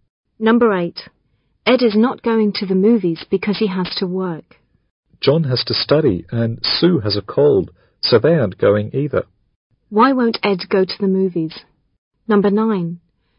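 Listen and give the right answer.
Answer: He has to work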